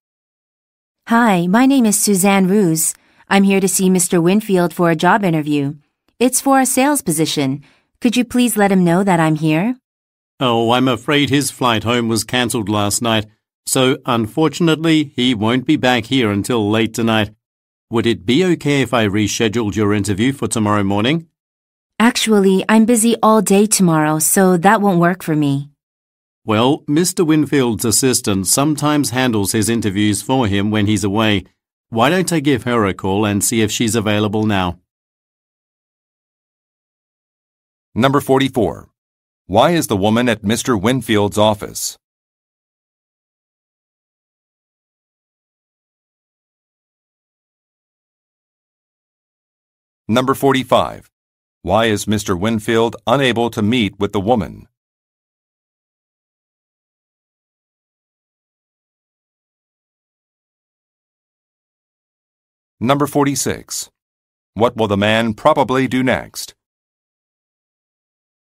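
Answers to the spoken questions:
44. For a job interview for a sales position
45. His flight home was cancelled
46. Call Mr. Winfield's assistant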